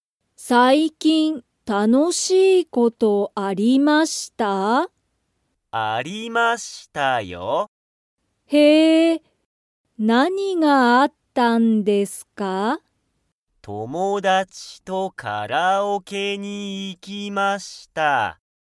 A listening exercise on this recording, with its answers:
佐藤(さとう)さんは、最近(さいきん)、楽(たの)しいことがありましたか?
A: はい